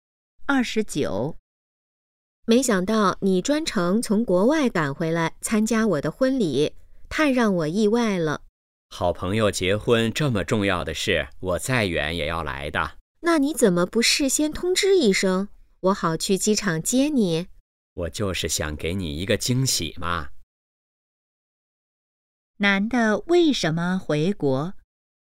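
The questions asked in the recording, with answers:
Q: 男的为什么回国?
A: 参加朋友的婚礼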